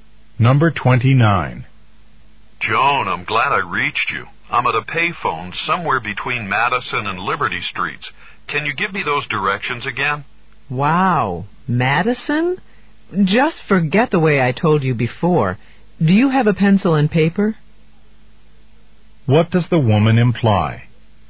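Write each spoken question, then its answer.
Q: What does the woman imply?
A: She'll give him new directions.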